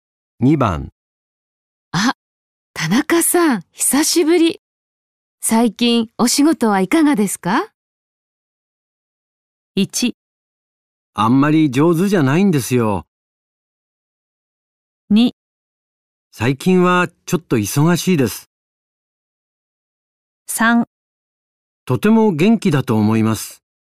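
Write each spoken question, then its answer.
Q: あ、田中さん、久しぶり。最近、お仕事はいかがですか?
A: 2: 最近はちょっと忙しいです。

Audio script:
1
あんまり上手じゃないんですよ。
2
最近はちょっと忙しいです。
3
とても元気だと思います。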